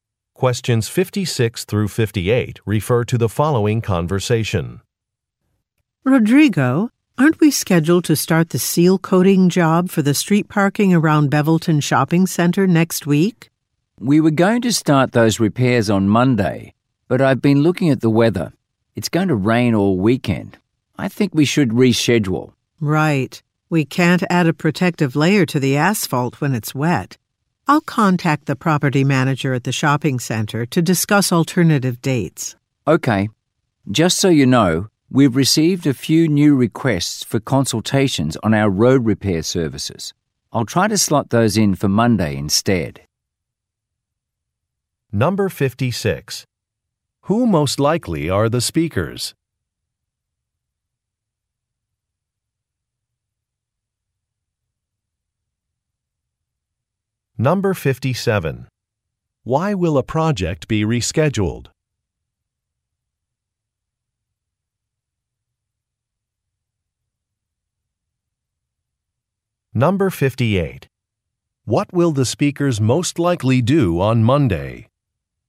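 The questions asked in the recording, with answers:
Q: Who most likely are the speakers?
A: Road repair workers

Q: Why will a project be rescheduled?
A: Rain is expected

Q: What will the speakers most likely do on Monday?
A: Hold consultations with new clients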